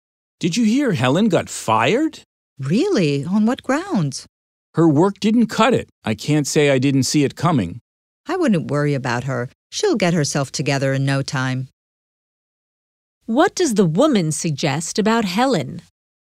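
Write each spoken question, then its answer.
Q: What does the woman suggest about Helen?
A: She will get back on her feet quickly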